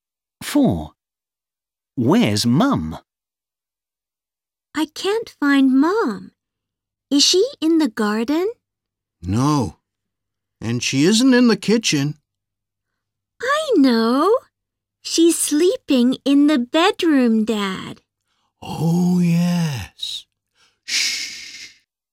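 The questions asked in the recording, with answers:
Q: Where's Mum?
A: sleeping in the bedroom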